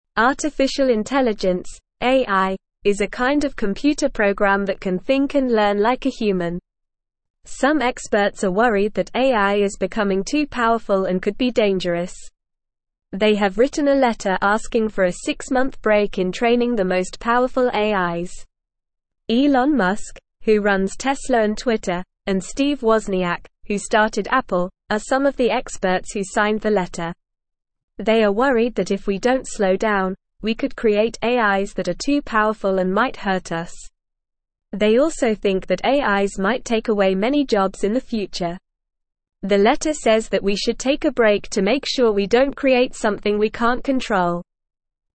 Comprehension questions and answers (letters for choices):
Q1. Some experts are scared that AI is becoming too (1)________ and could be dangerous.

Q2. They have written a letter asking for a six-month break in training the most (2)________ AIs.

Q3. They are worried that if we don't (3)________ down, we could create AIs that are too powerful and might hurt us.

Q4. They also think that AIs might take away many (4)________ in the future.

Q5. The letter says that we should take a break to make sure we don't create something we can't (5)________.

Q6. What is artificial intelligence (AI)?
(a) a kind of human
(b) a type of computer program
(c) a type of car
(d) a type of animal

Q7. Can AI think and learn like a human?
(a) Yes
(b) No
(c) Maybe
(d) Only on Sundays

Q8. Why are some experts worried about AI?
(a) They want to be famous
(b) They don't like computers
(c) They think it might be dangerous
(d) They think it's too expensive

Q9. Who signed the letter asking for a break in training the most powerful AIs?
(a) The president and the queen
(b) Elon Musk and Steve Wozniak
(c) Santa Claus and the Easter Bunny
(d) Batman and Superman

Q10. What are the experts worried might happen if we don't slow down training AIs?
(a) We might create AIs that are too powerful and might hurt us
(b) We might create AIs that are too weak and might help us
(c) We might create AIs that are too funny and might make us laugh too much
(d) We might create AIs that are too lazy and might not do anything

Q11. What do the experts think AIs might do in the future?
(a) Take away many jobs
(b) Give us more jobs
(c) Make us all rich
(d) Make us all famous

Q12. What does the letter say we should do?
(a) Take a break to make sure we don't create something we can't control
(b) Train AIs as fast as possible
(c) Create as many AIs as we can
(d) Ignore the danger of AIs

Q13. What does Elon Musk do?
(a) He runs Tesla and Twitter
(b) He is a famous actor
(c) He is a chef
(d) He is a professional gamer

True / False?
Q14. AI is a computer program that can think and learn like a human.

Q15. Some experts are not worried about AI becoming too powerful.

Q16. Elon Musk is one of the experts who signed the letter about AIs.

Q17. The letter is asking for a ten-year break in training the most powerful AIs.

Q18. Experts are not worried that AIs could hurt us.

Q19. AIs might take away many jobs in the future.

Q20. The letter says we should take a break to make sure we don't create something we can't control.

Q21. AI is not dangerous.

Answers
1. powerful
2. powerful
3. slow
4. jobs
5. control
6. b
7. a
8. c
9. b
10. a
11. a
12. a
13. a
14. True
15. False
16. True
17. False
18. False
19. True
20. True
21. False

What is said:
Artificial intelligence (AI) is a kind of computer program that can think and learn like a human. Some experts are worried that AI is becoming too powerful and could be dangerous. They have written a letter asking for a six-month break in training the most powerful AIs. Elon Musk, who runs Tesla and Twitter, and Steve Wozniak, who started Apple, are some of the experts who signed the letter. They are worried that if we don't slow down, we could create AIs that are too powerful and might hurt us. They also think that AIs might take away many jobs in the future. The letter says that we should take a break to make sure we don't create something we can't control.

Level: Level 1